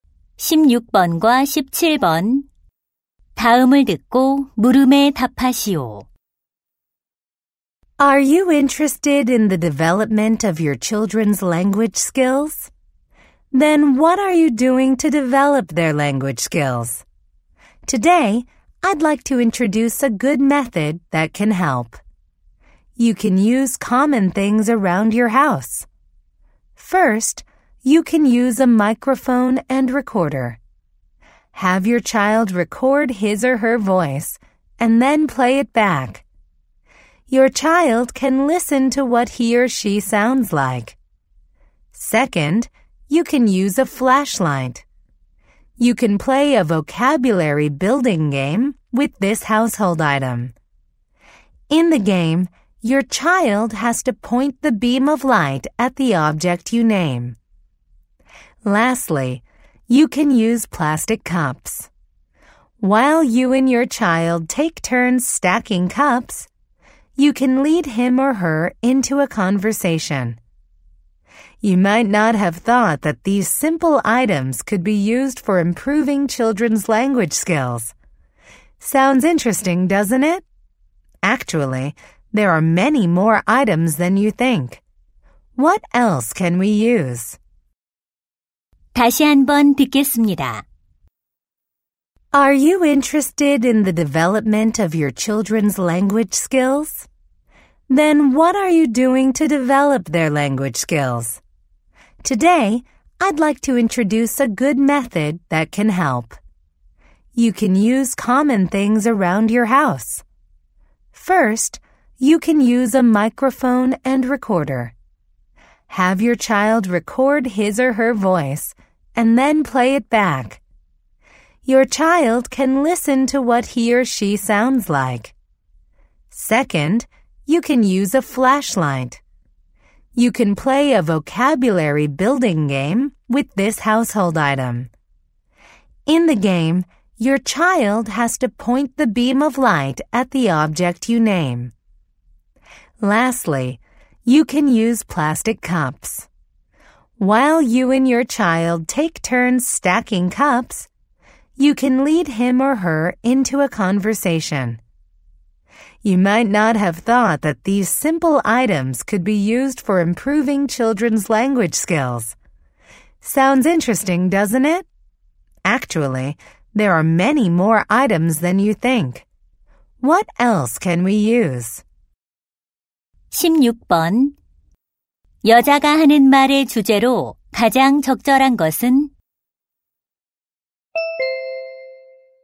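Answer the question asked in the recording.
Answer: 아이들의 언어 능력 발달에 가정용품을 활용하는 방법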